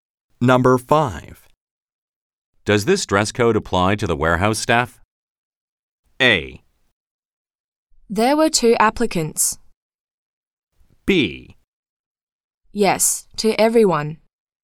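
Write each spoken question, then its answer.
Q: Does this dress code apply to the warehouse staff?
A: B: Yes, to everyone.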